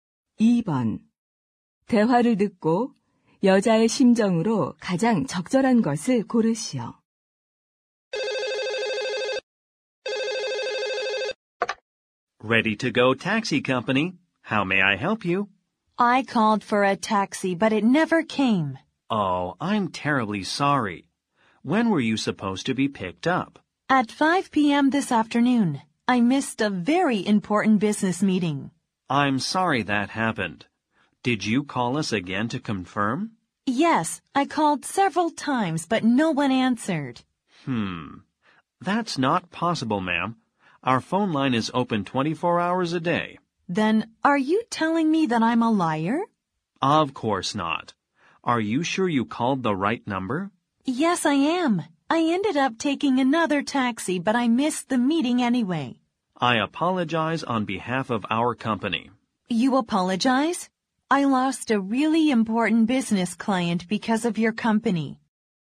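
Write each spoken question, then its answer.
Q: 대화를 듣고 여자의 심정으로 가장 적절한 것을 고르시오.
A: 화가 남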